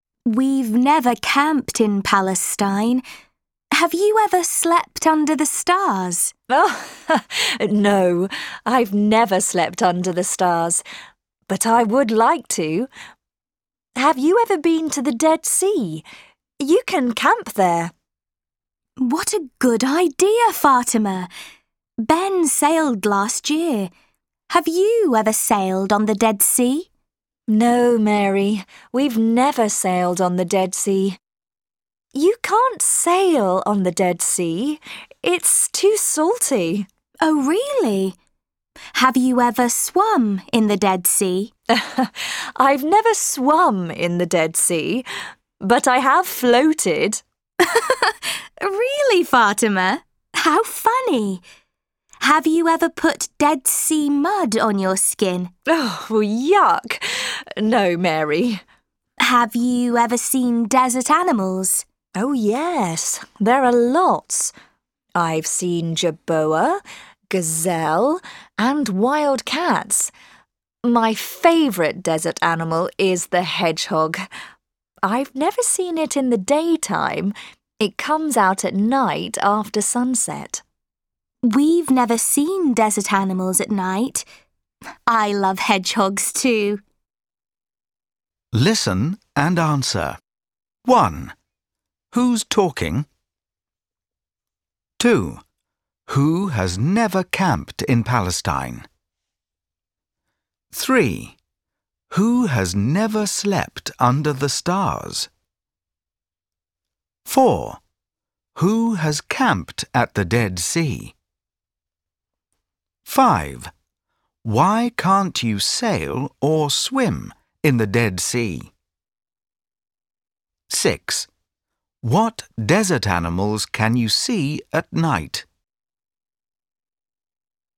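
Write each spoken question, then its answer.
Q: Why can't you sail or swim in the Dead Sea?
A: Because it's too salty

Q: What desert animals can you see at night?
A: The hedgehog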